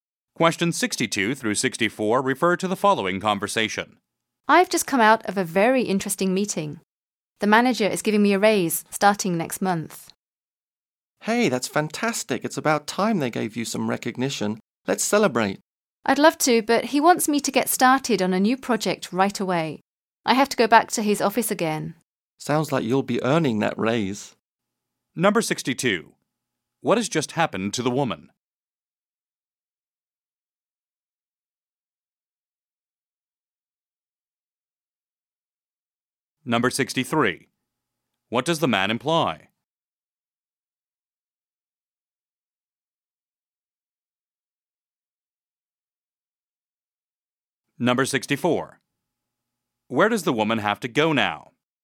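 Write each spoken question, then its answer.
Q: What has just happened to the woman?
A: She was given a raise

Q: What does the man imply?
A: She will have to work hard for the raise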